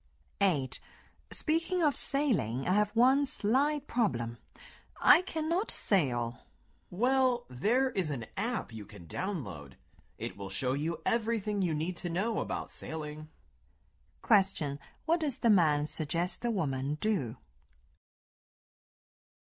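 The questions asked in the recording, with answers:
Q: What does the man suggest the woman do?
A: Download an app that teaches sailing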